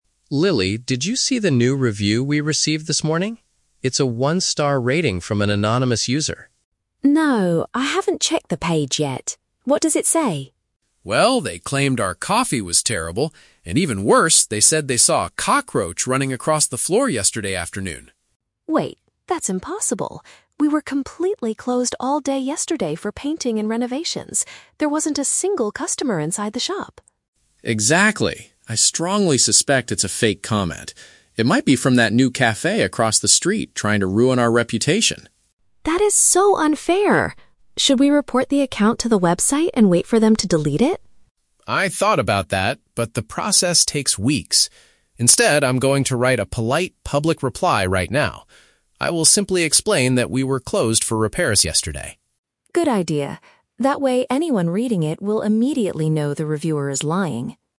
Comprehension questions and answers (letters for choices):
Listen to a conversation between a coffee shop owner and a barista. Choose the correct answer (A, B, or C).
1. What is the main issue the speakers are discussing?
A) A customer complaining about cold coffee.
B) A false and damaging online comment.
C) A health inspection from the city council.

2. How do the speakers know the review is not real?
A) Because they already know the person who wrote it.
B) Because they hired a professional cleaning service.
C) Because the business was not open on that day.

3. What does the owner decide to do about the situation?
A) Ask the website to remove the negative rating.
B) Post a respectful answer to explain the truth.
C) Go across the street to confront the competitor.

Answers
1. B
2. C
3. B

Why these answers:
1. The speakers are discussing a "fake comment" (false) that was meant to "ruin our reputation" (damaging). The Trap: Option (A) is a trap. The audio mentions the reviewer claimed the coffee was "terrible," but this is part of the fake review, not an actual customer complaint they are trying to fix. Option (C) is a plausible real-world consequence of a cockroach report, but it is not mentioned.
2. Lily realizes the review is a lie because they were "completely closed all day yesterday for painting and renovations." "Not open" is a paraphrase for "closed." The Trap: Option (A) is the opposite of the audio. Mark says the review is from an "anonymous user," meaning they don't know who wrote it. Option (B) is a logical assumption about dealing with insects, but it is not mentioned in the dialogue.
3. Mark decides to "write a polite, public reply" and "explain that we were closed for repairs." "Respectful" is a B1 synonym for "polite." The Trap: Option (A) is a trap. Lily suggests reporting it so the website will delete it, but Mark rejects this idea because it "takes weeks." Option (C) mentions the competitor across the street, but Mark never suggests going there to fight or confront them.

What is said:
Mark: Lily, did you see the new review we received this morning? It's a one-star rating from an anonymous user.
Lily: No, I haven't checked the page yet. What does it say?
Mark: Well, they claimed our coffee was terrible, and even worse, they said they saw a cockroach running across the floor yesterday afternoon.
Lily: Wait, that's impossible! We were completely closed all day yesterday for painting and renovations. There wasn't a single customer inside the shop!
Mark: Exactly. I strongly suspect it's a fake comment. It might be from that new cafe across the street, trying to ruin our reputation.
Lily: That is so unfair. Should we report the account to the website and wait for them to delete it?
Mark: I thought about that, but the process takes weeks. Instead, I'm going to write a polite, public reply right now. I will simply explain that we were closed for repairs yesterday.
Lily: Good idea. That way, anyone reading it will immediately know the reviewer is lying.